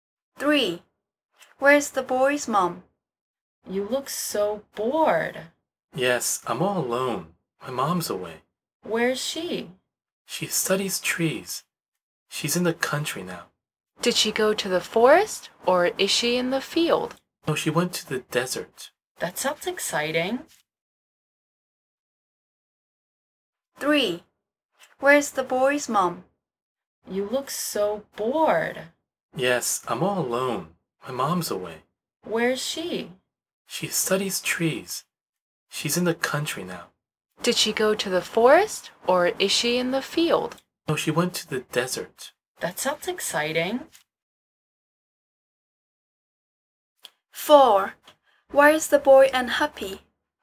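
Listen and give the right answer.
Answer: in the desert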